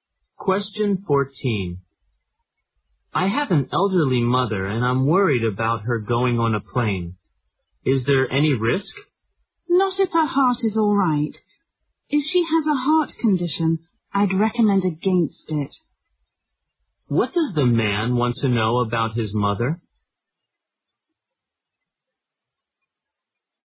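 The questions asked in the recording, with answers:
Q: What does the man want to know about his mother?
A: Whether it is risky for her to travel by plane.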